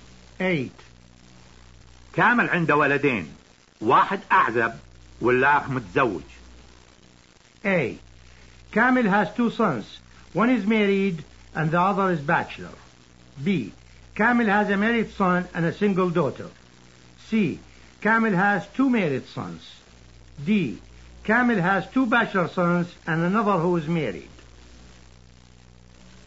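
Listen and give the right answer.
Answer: A: كامل has 2 sons. One is married and the other is bachelor.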